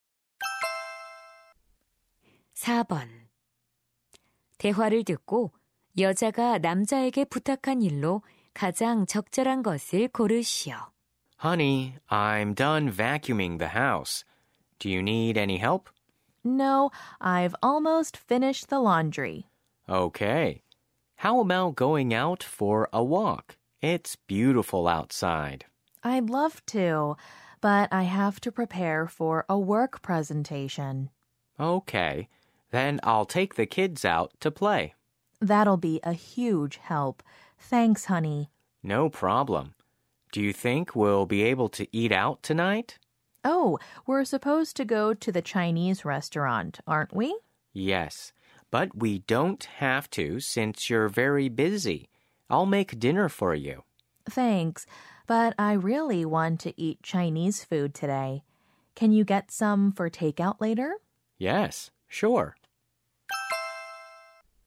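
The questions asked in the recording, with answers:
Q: 대화를 듣고 여자가 남자에게 부탁한 일로 가장 적절한 것을 고르시오.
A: 중국 음식 포장해 오기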